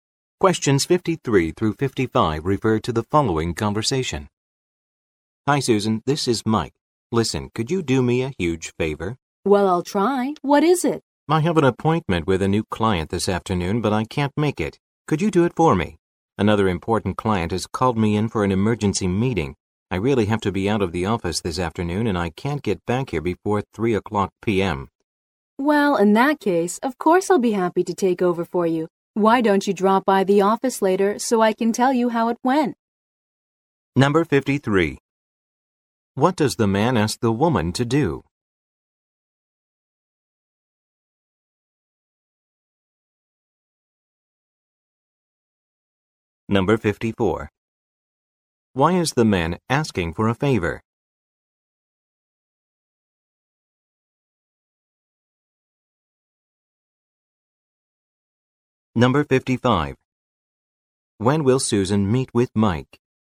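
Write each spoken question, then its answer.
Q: What does the man ask the woman to do?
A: Meet a new client for him

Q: Why is the man asking for a favor?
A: He has an emergency meeting with another client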